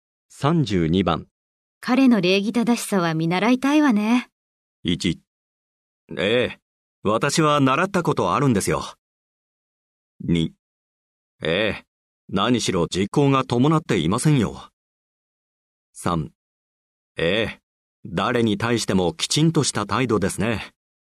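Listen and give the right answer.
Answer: 3: ええ。誰に対してもきちんとした態度ですね。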